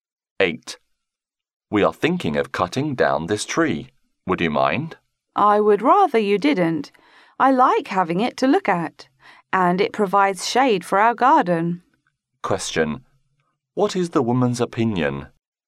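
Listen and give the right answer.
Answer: She doesn't want the tree cut down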